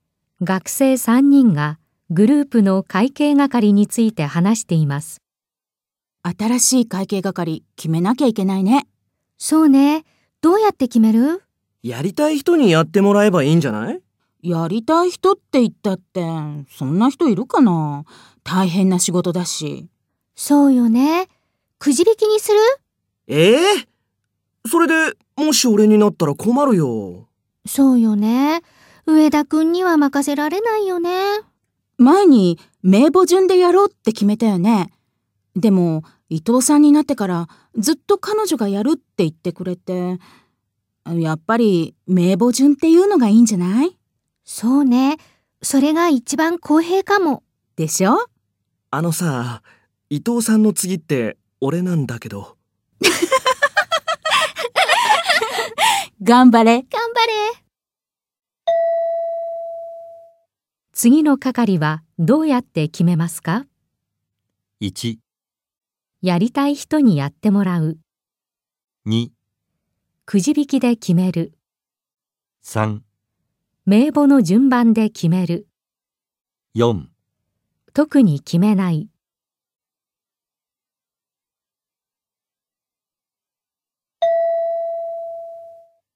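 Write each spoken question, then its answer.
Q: 次の係はどうやって決めますか?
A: 3: 名簿の順番で決める。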